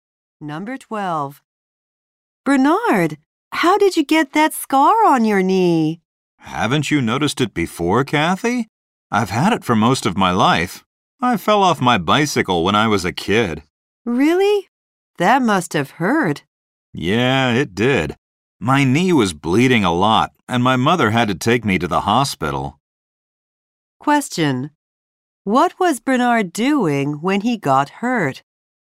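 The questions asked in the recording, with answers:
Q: What was Bernard doing when he got hurt?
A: Riding his bicycle.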